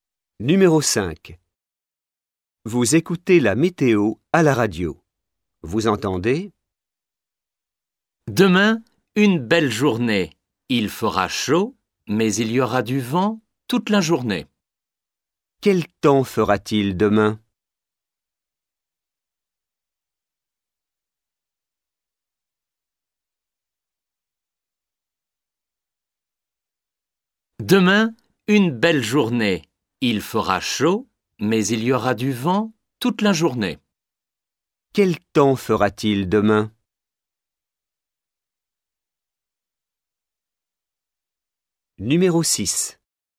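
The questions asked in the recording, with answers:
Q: Quel temps fera-t-il demain?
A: Chaud avec du vent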